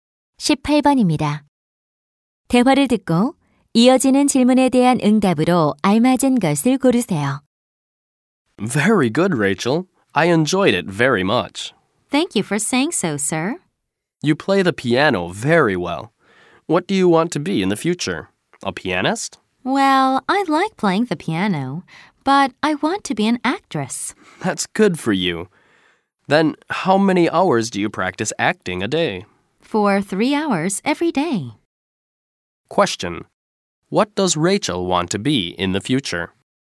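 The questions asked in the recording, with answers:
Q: What does Rachel want to be in the future?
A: An actress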